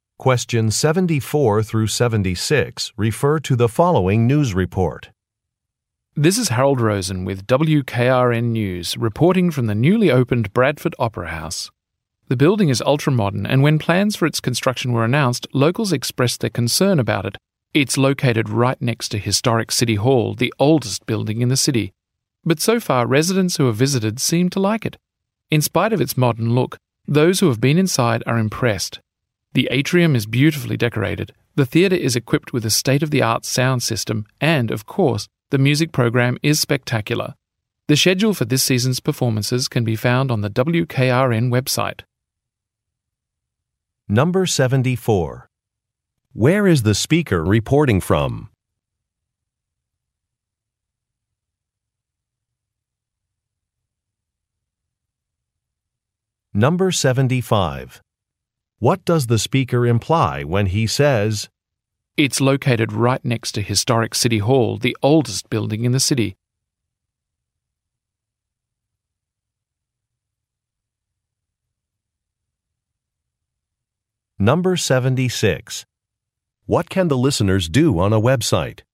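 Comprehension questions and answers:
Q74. Where is the speaker reporting from?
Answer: An opera house

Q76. What can the listeners do on a Web site?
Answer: View a performance schedule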